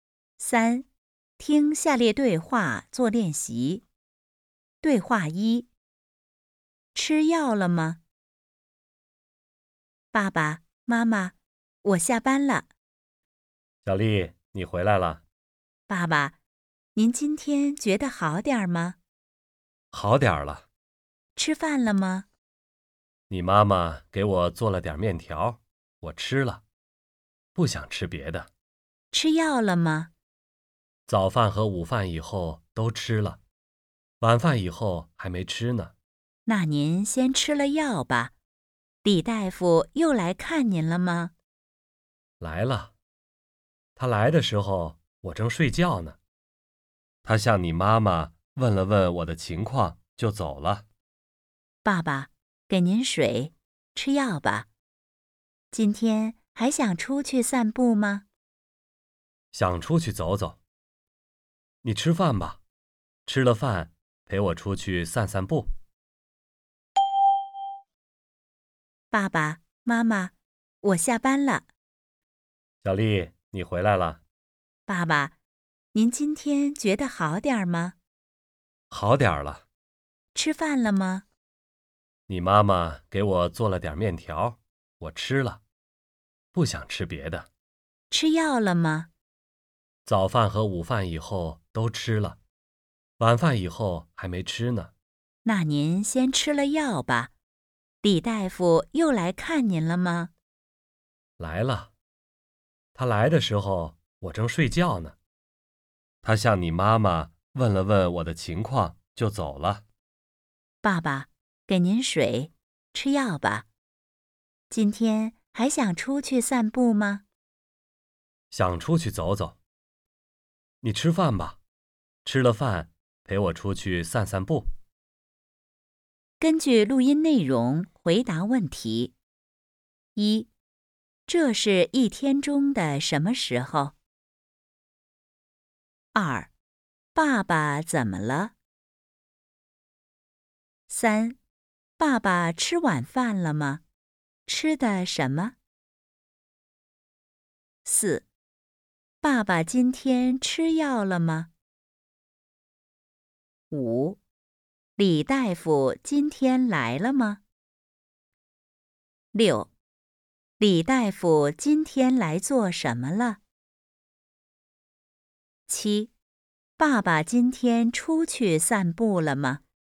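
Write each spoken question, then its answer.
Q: 这是一天中的什么时候?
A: 晚上

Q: 爸爸怎么了?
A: 生病了

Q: 爸爸吃晚饭了吗?吃的什么?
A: 吃了,吃的面条

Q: 爸爸今天吃药了吗?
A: 吃了,早饭和午饭以后吃了,晚饭以后还没吃

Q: 李大夫今天来了吗?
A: 来了

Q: 李大夫今天来做什么了?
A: 来看爸爸,问了问他的情况

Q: 爸爸今天出去散步了吗?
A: 还没有,想吃了饭以后出去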